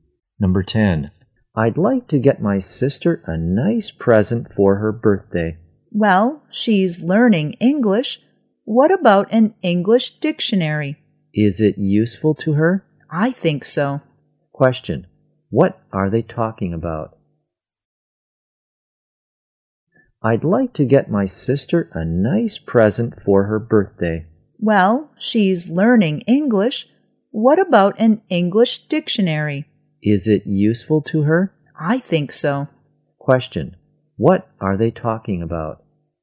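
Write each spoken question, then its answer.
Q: What are they talking about?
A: A birthday present for the sister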